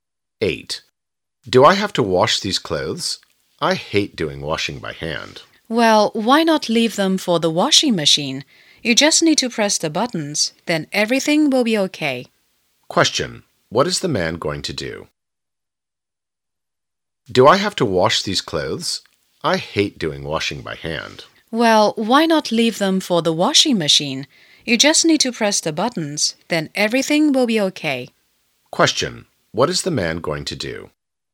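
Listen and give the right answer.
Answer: Wash the clothes in the washing machine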